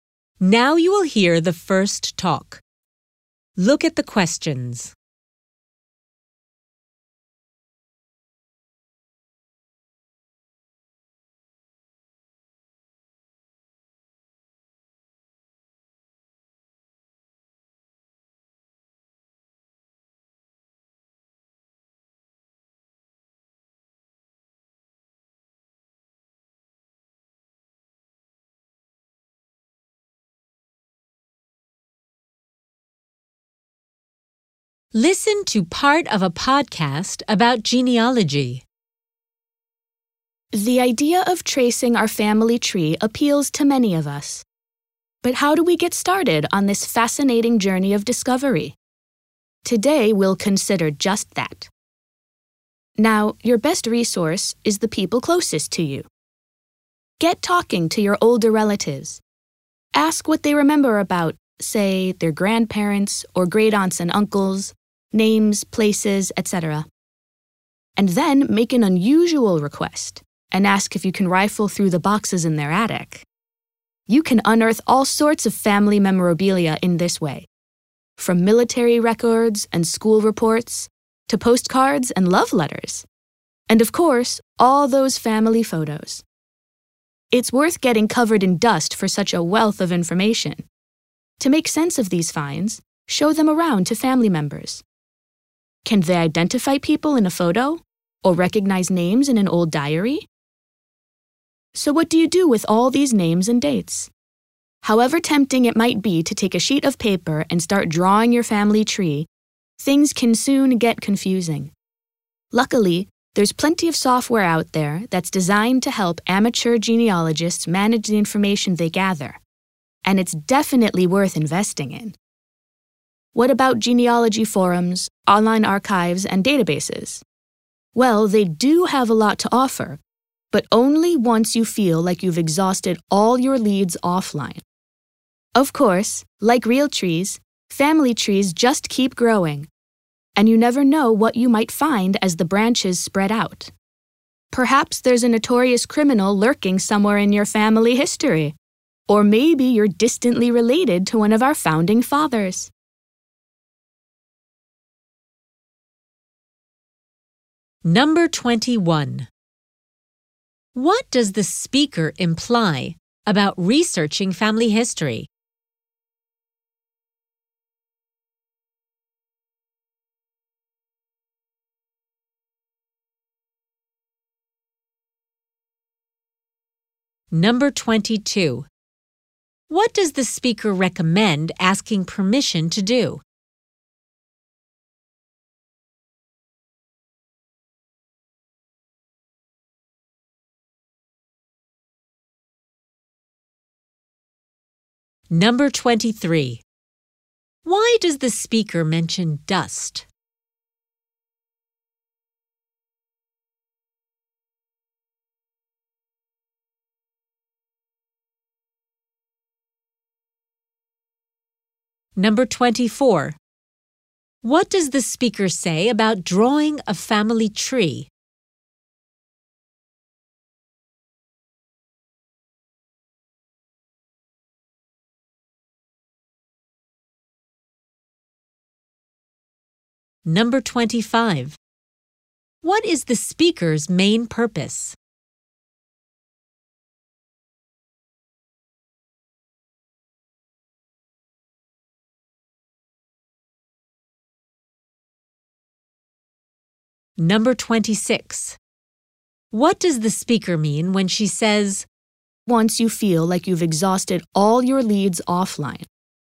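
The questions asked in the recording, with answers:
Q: What does the speaker recommend asking permission to do?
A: Search through boxes in older relatives' attics

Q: Why does the speaker mention dust?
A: To say searching attics is worth it for the information found

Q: What does the speaker say about drawing a family tree?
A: It can get confusing; genealogy software is better

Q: What is the speaker's main purpose?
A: To explain how to get started tracing your family tree

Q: What does the speaker mean when she says,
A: Use online resources only after trying all offline sources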